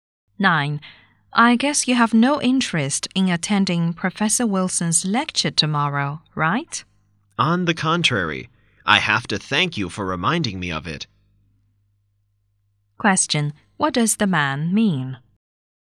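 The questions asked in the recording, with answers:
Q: What does the man mean?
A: He wants to attend the lecture.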